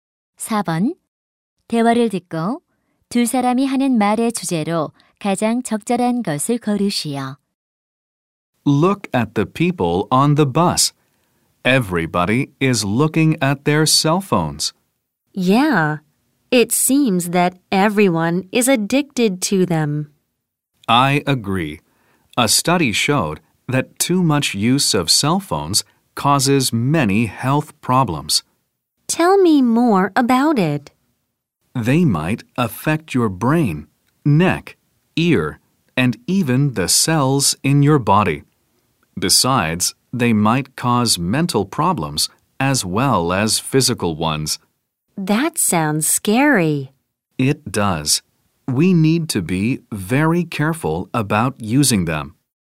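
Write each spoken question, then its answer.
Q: 대화를 듣고 두 사람이 하는 말의 주제로 가장 적절한 것을 고르시오.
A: 휴대전화 과다 사용이 건강에 미치는 해로움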